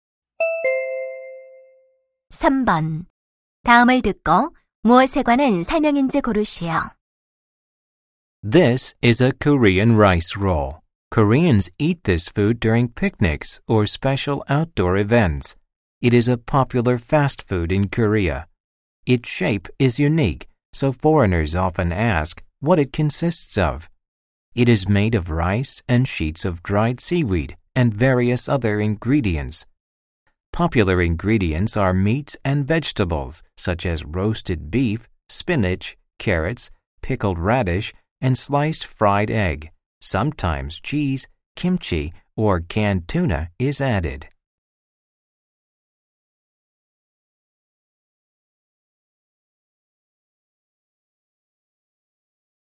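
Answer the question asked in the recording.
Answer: 김밥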